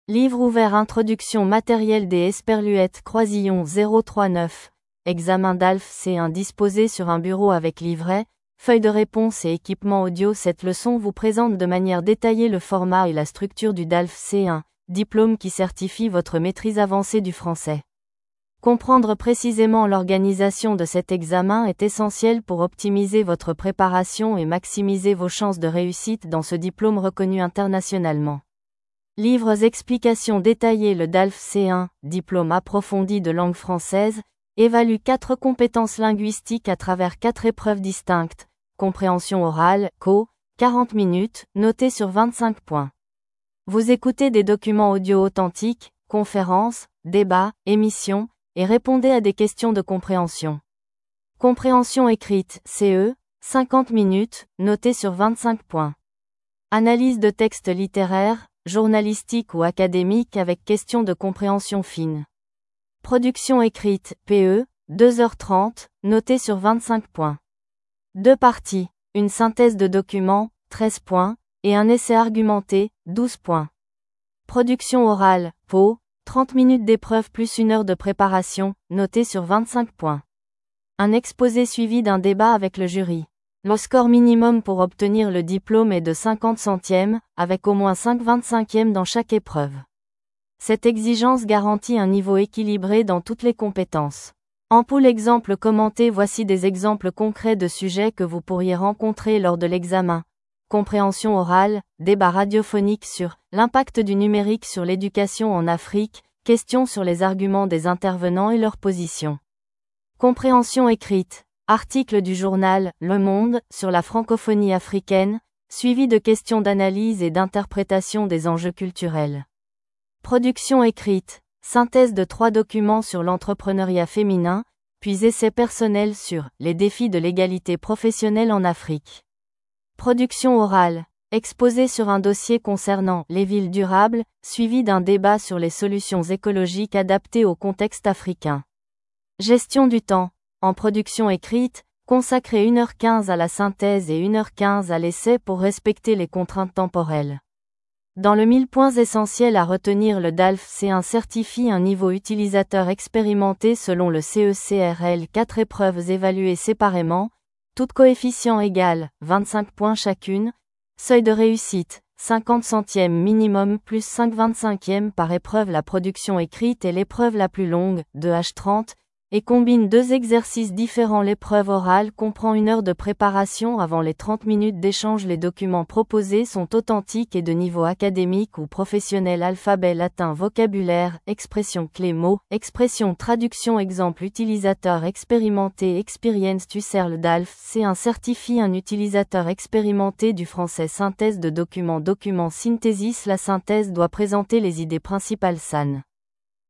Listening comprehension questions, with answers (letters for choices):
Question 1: Combien de temps dure l'épreuve de compréhension écrite ?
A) 40 minutes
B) 50 minutes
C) 60 minutes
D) 1h30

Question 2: Quel est le score minimum requis pour obtenir le DALF C1 ?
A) 50/100 avec 5/25 par épreuve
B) 60/100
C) 50/100 sans condition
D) 12/25 par épreuve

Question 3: Combien d'exercices comporte l'épreuve de production écrite ?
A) Un seul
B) Deux exercices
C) Trois exercices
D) Quatre exercices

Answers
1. B
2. A
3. B

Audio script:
📖 Introduction
Matériel d'examen DALF C1 disposé sur un bureau avec livrets, feuilles de réponse et équipement audio
Cette leçon vous présente de manière détaillée le format et la structure du DALF C1, diplôme qui certifie votre maîtrise avancée du français. Comprendre précisément l'organisation de cet examen est essentiel pour optimiser votre préparation et maximiser vos chances de réussite dans ce diplôme reconnu internationalement.
📚 Explications détaillées
Le DALF C1 (Diplôme Approfondi de Langue Française) évalue quatre compétences linguistiques à travers quatre épreuves distinctes :
Compréhension orale (CO) : 40 minutes, notée sur 25 points. Vous écoutez des documents audio authentiques (conférences, débats, émissions) et répondez à des questions de compréhension.
Compréhension écrite (CE) : 50 minutes, notée sur 25 points. Analyse de textes littéraires, journalistiques ou académiques avec questions de compréhension fine.
Production écrite (PE) : 2h30, notée sur 25 points. Deux parties : une synthèse de documents (13 points) et un essai argumenté (12 points).
Production orale (PO) : 30 minutes d'épreuve + 1 heure de préparation, notée sur 25 points. Un exposé suivi d'un débat avec le jury.
Le score minimum pour obtenir le diplôme est de 50/100, avec au moins 5/25 dans chaque épreuve. Cette exigence garantit un niveau équilibré dans toutes les compétences.
Voici des exemples concrets de sujets que vous pourriez rencontrer lors de l'examen :
Compréhension orale : Débat radiophonique sur "L'impact du numérique sur l'éducation en Afrique" - Questions sur les arguments des intervenants et leurs positions.
Compréhension écrite : Article du journal "Le Monde" sur la francophonie africaine, suivi de questions d'analyse et d'interprétation des enjeux culturels.
Production écrite : Synthèse de trois documents sur l'entrepreneuriat féminin, puis essai personnel sur "Les défis de l'égalité professionnelle en Afrique".
Production orale : Exposé sur un dossier concernant "Les villes durables" suivi d'un débat sur les solutions écologiques adaptées au contexte africain.
Gestion du temps : En production écrite, consacrer 1h15 à la synthèse et 1h15 à l'essai pour respecter les contraintes temporelles.
🎯 Points essentiels à retenir
Le DALF C1 certifie un niveau utilisateur expérimenté selon le CECRL
Quatre épreuves évaluées séparément, toutes coefficient égal (25 points chacune)
Seuil de réussite : 50/100 minimum + 5/25 par épreuve
La production écrite est l'épreuve la plus longue (2h30) et combine deux exercices différents
L'épreuve orale comprend 1 heure de préparation avant les 30 minutes d'échange
Les documents proposés sont authentiques et de niveau académique ou professionnel
Traduction
Exemple
Utilisateur expérimenté
Le DALF C1 certifie un utilisateur expérimenté du français
Synthèse de documents
Document synthesis
La synthèse doit présenter les idées principales sans opinion personnelle
Essai argumenté

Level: DALF C1